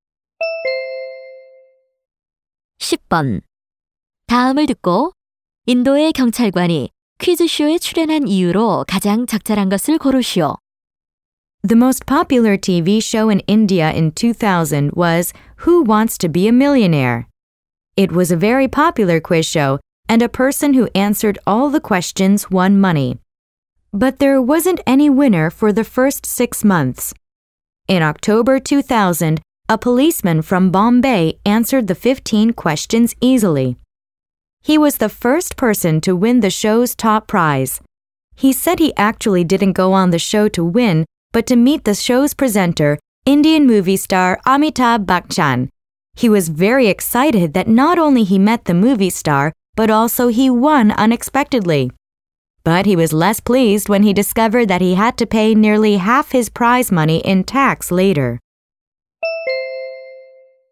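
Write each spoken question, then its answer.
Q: 인도의 경찰관이 퀴즈쇼에 출연한 이유로 가장 적절한 것을 고르시오.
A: 사회자인 영화배우 Amitabh Bachchan을 만나기 위해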